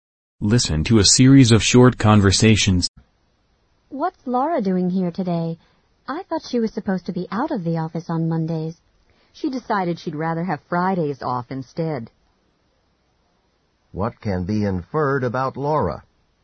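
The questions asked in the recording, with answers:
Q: What can be inferred about Laura?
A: She now takes Fridays off instead of Mondays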